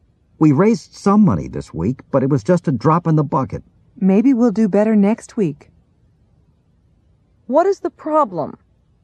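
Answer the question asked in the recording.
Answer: They raised only a small amount of money.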